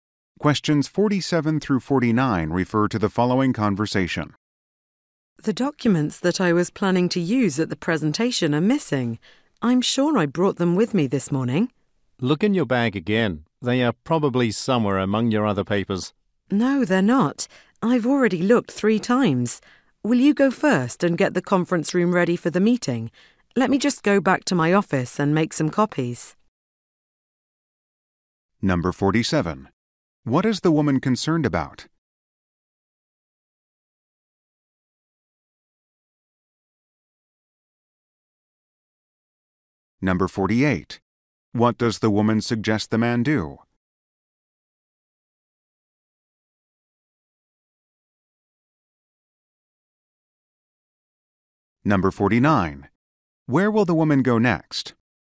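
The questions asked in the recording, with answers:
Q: What is the woman concerned about?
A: Her presentation documents are missing

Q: What does the woman suggest the man do?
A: Go first and get the conference room ready

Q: Where will the woman go next?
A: Back to her office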